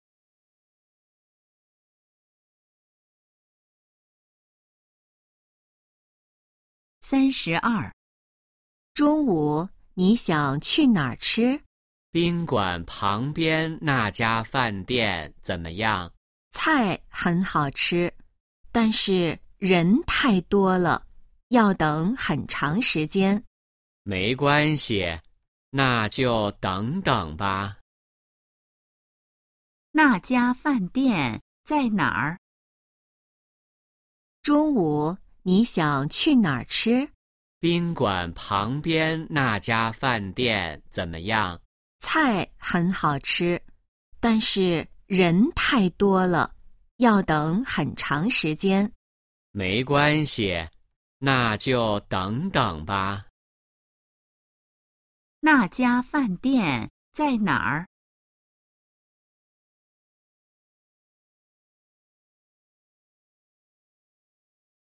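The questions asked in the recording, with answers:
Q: 那家饭店在哪儿?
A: 宾馆旁边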